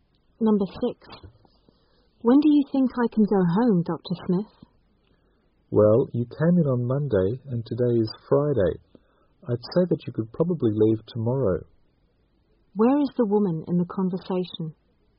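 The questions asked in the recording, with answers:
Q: Where is the woman in the conversation?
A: In a hospital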